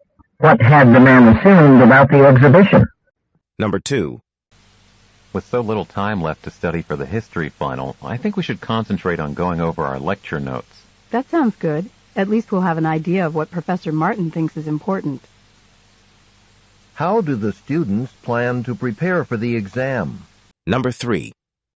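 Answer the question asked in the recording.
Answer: By going over their lecture notes.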